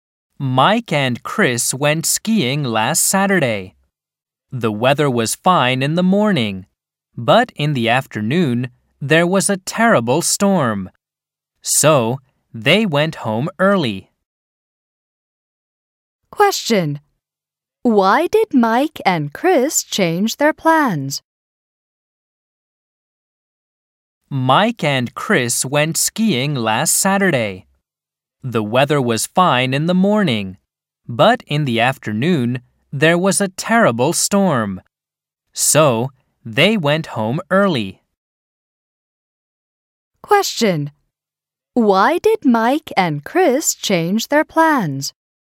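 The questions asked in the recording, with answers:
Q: Why did Mike and Chris change their plans?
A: Because there was a terrible storm in the afternoon.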